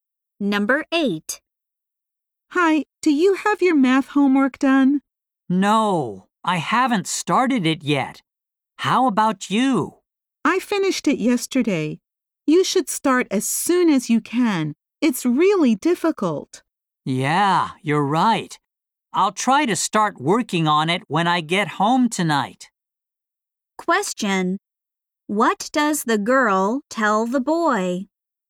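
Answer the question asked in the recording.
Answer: He should start the math homework soon because it's difficult.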